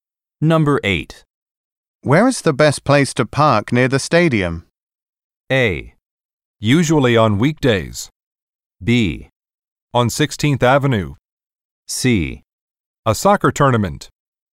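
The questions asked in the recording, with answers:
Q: Where is the best place to park near the stadium?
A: B: On 16th Avenue.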